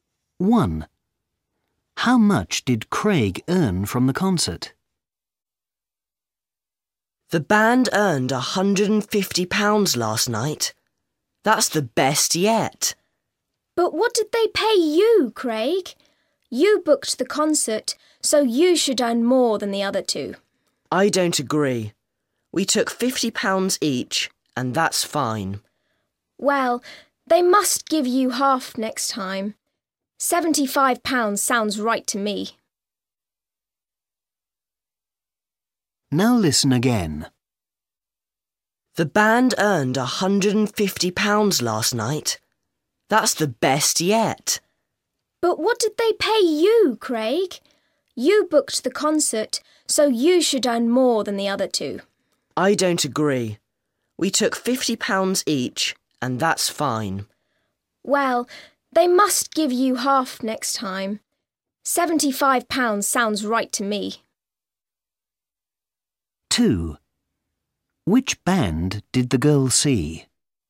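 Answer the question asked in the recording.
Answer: £50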